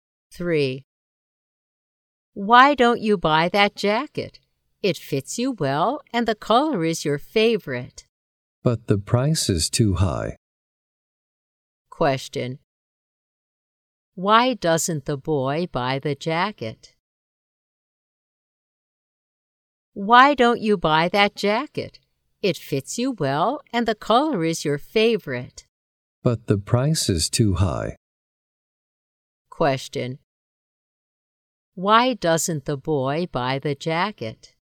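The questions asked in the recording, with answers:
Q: Why doesn't the boy buy the jacket?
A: The price is too high.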